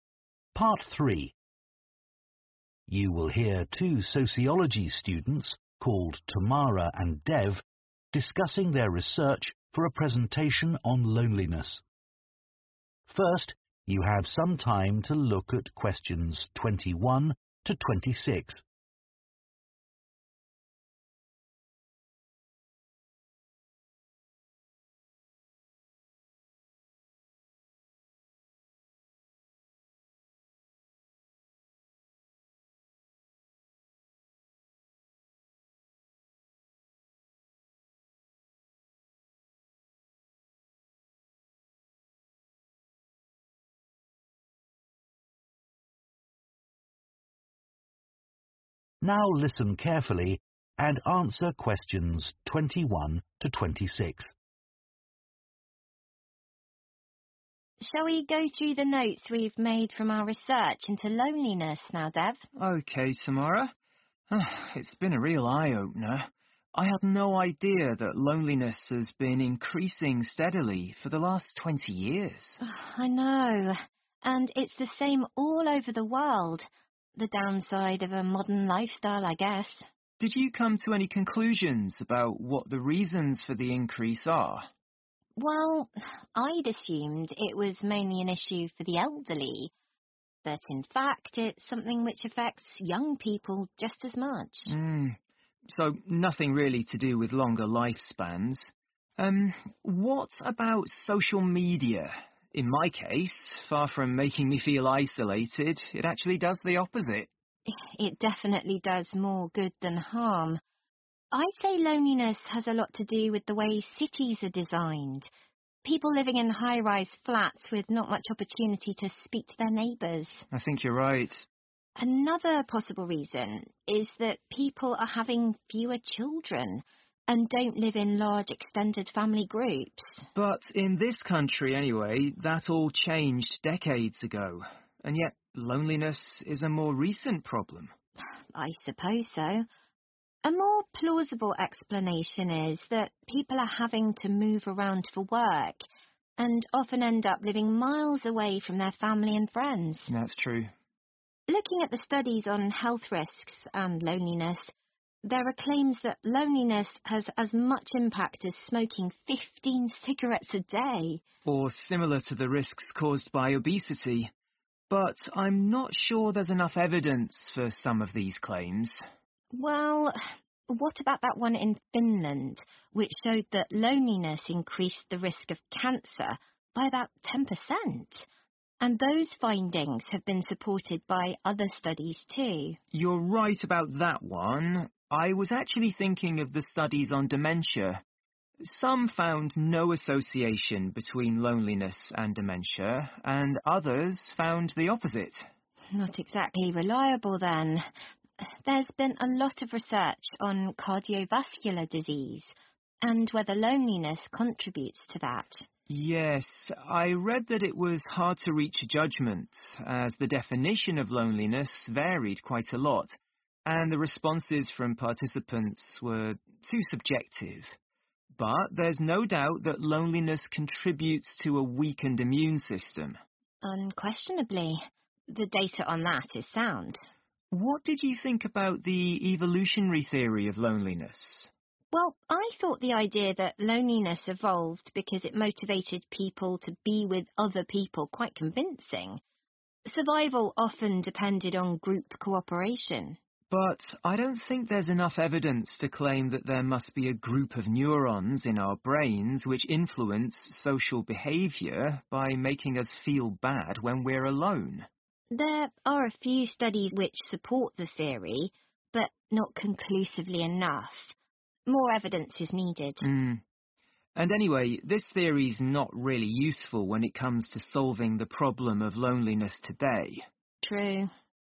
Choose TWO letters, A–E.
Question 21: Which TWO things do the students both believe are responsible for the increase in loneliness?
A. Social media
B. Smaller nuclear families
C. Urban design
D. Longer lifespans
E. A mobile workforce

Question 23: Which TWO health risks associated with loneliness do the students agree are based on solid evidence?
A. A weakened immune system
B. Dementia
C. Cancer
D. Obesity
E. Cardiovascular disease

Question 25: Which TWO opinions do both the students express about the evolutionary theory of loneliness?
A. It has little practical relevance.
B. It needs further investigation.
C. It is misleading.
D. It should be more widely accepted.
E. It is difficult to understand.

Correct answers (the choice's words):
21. Urban design
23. A weakened immune system
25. It has little practical relevance.

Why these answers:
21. The correct answer includes urban design and a mobile workforce because Tamara mentions that loneliness has a lot to do with the way cities are designed and also points out that people have to move for work, which makes them live far from family and friends. These factors contribute to the lack of community and interaction, leading to increased loneliness.
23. The correct answer is A and C because Tamara and Dev have a conversation that supports these points. They mention that loneliness weakens the immune system and reference studies showing that loneliness increases the risk of cancer by about 10%. They talk about how the data on the immune system is reliable, and they share information from studies in Finland that connect loneliness with cancer.
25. The correct answer is A (It has little practical relevance) and B (It needs further investigation) because in the conversation, Tamara and Dev say that while there are some studies about the evolutionary theory, they are not strong enough. They also mention that this theory does not help with the current problem of loneliness, showing that they believe it needs more research and is not very useful.

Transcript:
TAMARA Shall we go through the notes we've made from our research into loneliness now, Dev?
DEV OK, Tamara. It's been a real eye-opener. I had no idea that loneliness has been increasing steadily for the last 20 years.
TAMARA I know. And it's the same all over the world. The downside of a modern lifestyle, I guess.
DEV Did you come to any conclusions about what the reasons for the increase are?
TAMARA Well, I'd assumed it was mainly an issue for the elderly, but in fact it's something which affects young people just as much.
DEV So nothing really to do with longer lifespans. What about social media? In my case, far from
making me feel isolated, it actually does the opposite. it?
TAMARA It definitely does more good than harm. I'd say loneliness has a lot to do with the way cities are designed. People living in high flats with not much opportunity to speak to their neighbours
DEV I think you right
TAMARA Another possible reason is that people are having fewer children and don live in large extended family groups.
DEV But in this country anyway, that all changed decades ago. And yet loneliness is a more recent problem.
TAMARA I suppose so. A more plausible explanation is that people are having to move around for work and often end up living miles away from their family and friends.
DEV That's true.
TAMARA Looking at the studies on health risks and loneliness, there are claims that loneliness has as much impact as smoking 15 cigarettes a day.
DEV Or similar to the risks caused by obesity. But I'm not sure there's enough evidence for some of these claims.
TAMARA Well, what about that one in Finland, which showed that loneliness increased the risk of cancer by about 10%? And those findings have been supported by other studies too.
DEV You're right about that one. I was actually thinking of the studies on dementia. Some found no association between loneliness and dementia, and others found the opposite.
TAMARA Not exactly reliable, then. There's been a lot of research on cardiovascular disease and whether loneliness contributes to that.
DEV Yes, I read that it was hard to reach a judgment, as the definition of loneliness varied quite a lot, and the responses from participants were too subjective. But there's no doubt that loneliness contributes to a weakened immune system.
TAMARA Unquestionably. The data on that is sound.
DEV What did you think about the evolutionary theory of loneliness?
TAMARA Well I thought the idea that loneliness evolved because it motivated people to be with other people is quite convincing. Survival often depended on group cooperation.
DEV But I don't think there is enough evidence to claim that there must be a group of neurons in our brains which influence social behaviour by making us feel bad when we're alone.
TAMARA There are a few studies which support the theory, but not conclusively enough. More evidence is needed.
DEV And anyway, this theory's not really useful when it comes to solving the problem of loneliness today.